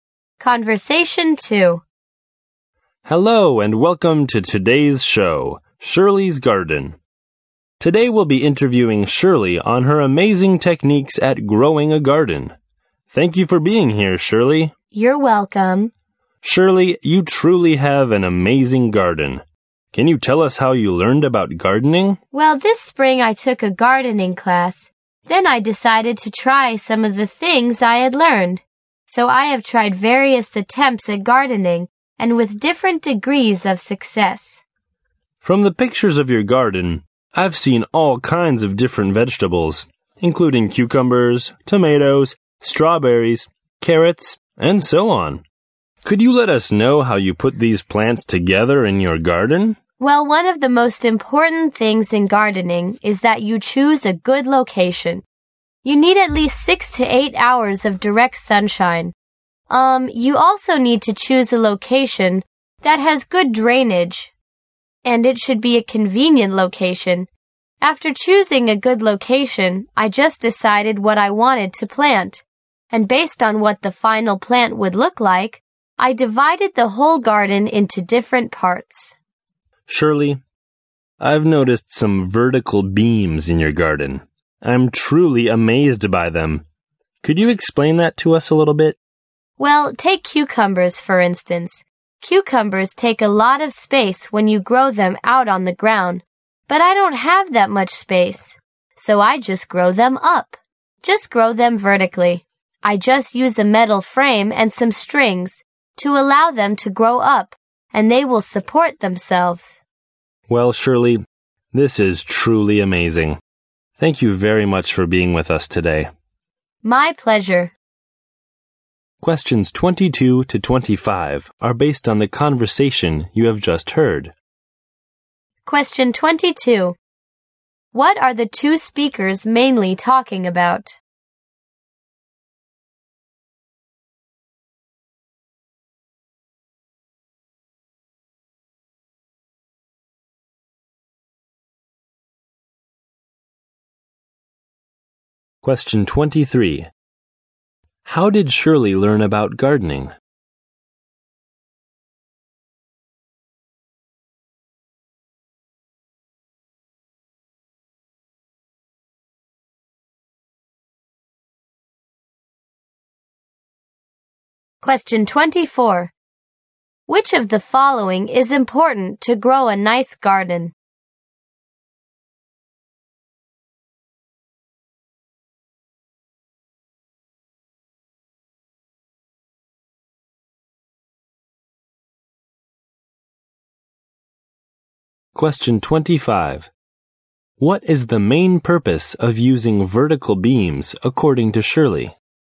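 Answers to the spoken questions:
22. Shirley's gardening techniques
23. She took a gardening class this spring
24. Choosing a good location
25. To save space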